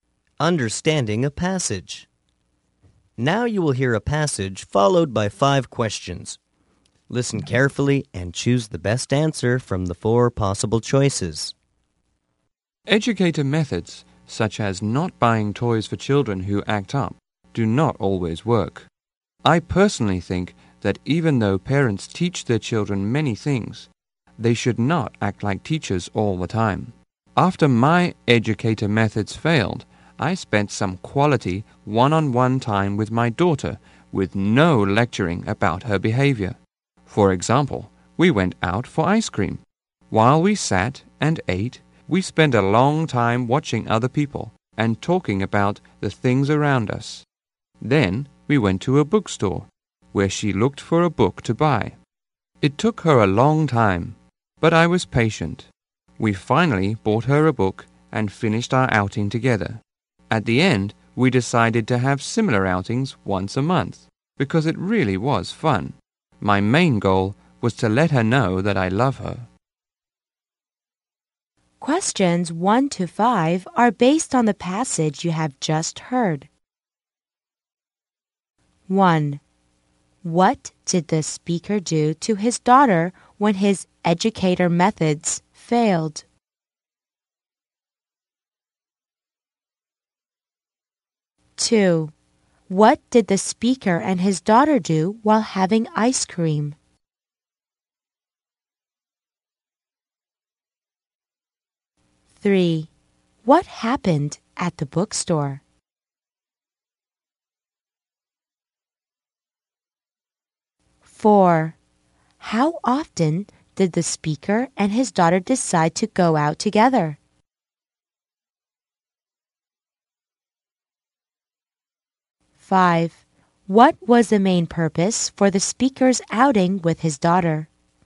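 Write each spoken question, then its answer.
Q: What did the speaker do to his daughter when his educator methods failed?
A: Spent quality one-on-one time with her without lecturing.

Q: What did the speaker and his daughter do while having ice cream?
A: Watched other people and talked about things around them.

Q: What happened at the bookstore?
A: The daughter took a long time choosing a book and he was patient; they bought her a book.

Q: How often did the speaker and his daughter decide to go out together?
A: Once a month.

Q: What was the main purpose for the speaker's outing with his daughter?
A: To let her know that he loves her.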